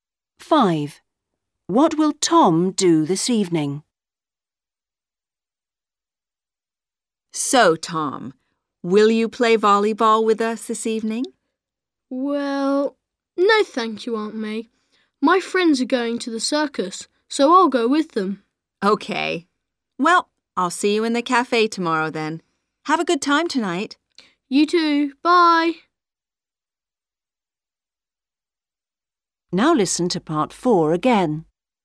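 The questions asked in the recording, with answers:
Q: What will Tom do this evening?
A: Go to the circus with his friends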